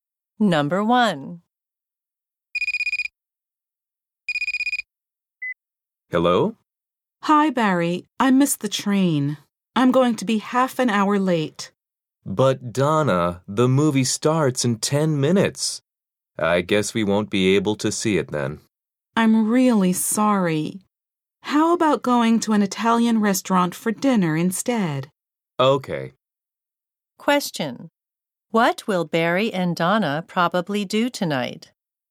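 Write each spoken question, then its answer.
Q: What will Barry and Donna probably do tonight?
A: Go to an Italian restaurant for dinner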